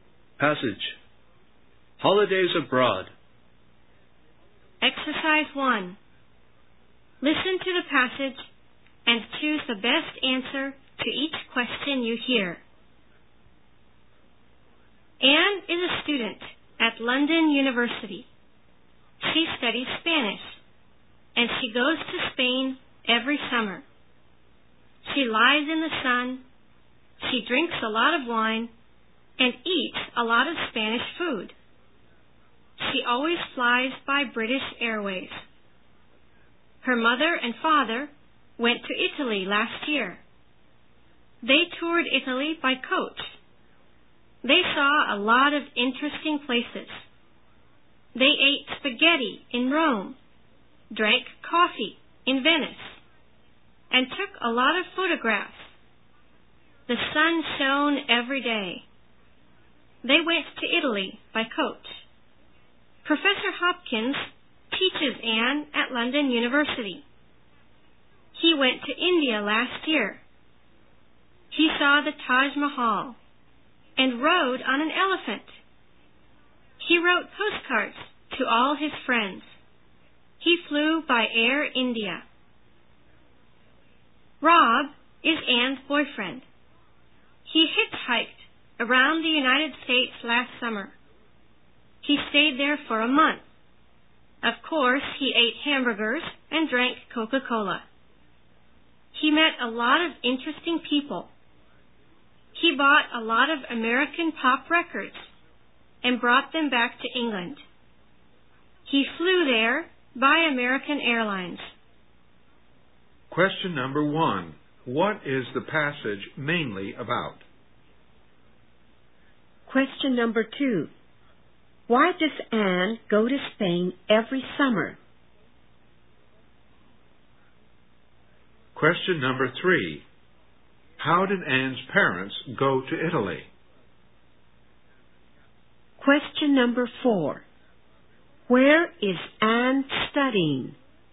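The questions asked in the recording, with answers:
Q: What is the passage mainly about?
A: Holidays abroad taken by Anne and people she knows

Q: How did Anne's parents go to Italy?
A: By coach

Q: Where is Anne studying?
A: At London University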